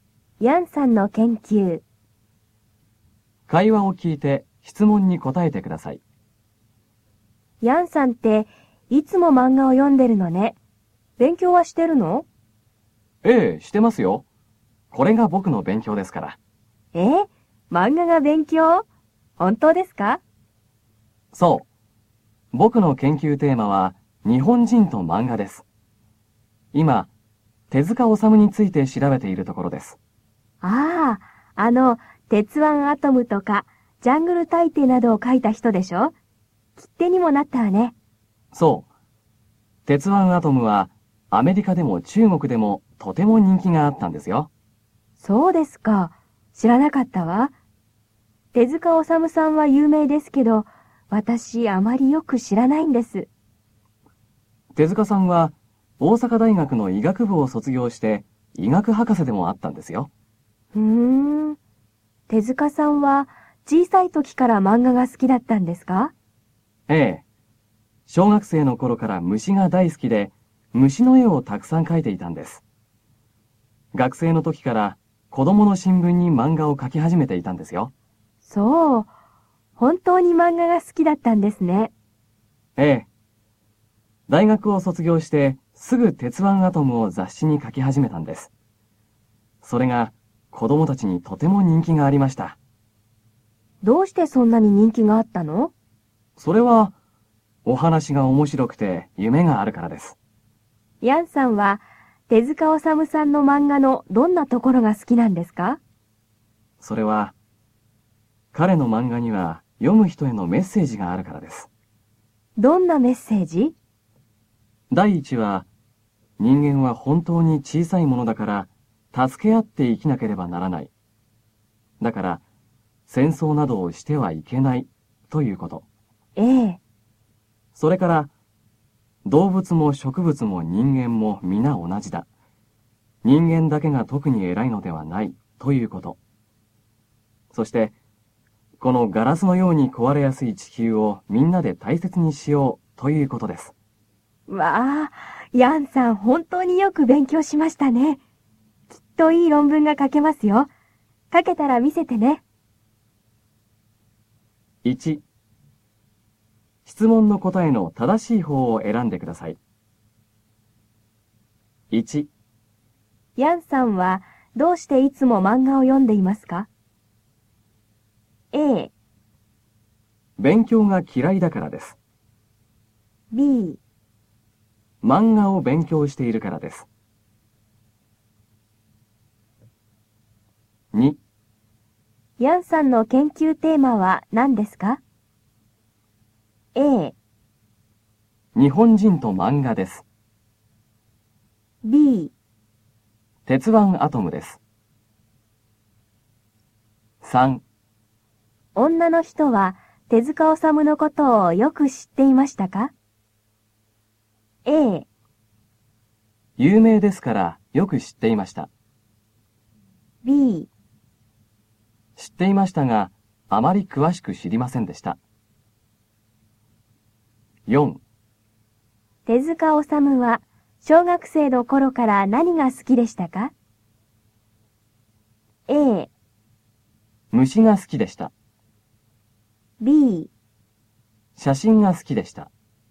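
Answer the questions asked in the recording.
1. B: 漫画を勉強しているからです。
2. A: 日本人と漫画です。
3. B: 知っていましたがあまり詳しく知りませんでした。
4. A: 虫が好きでした。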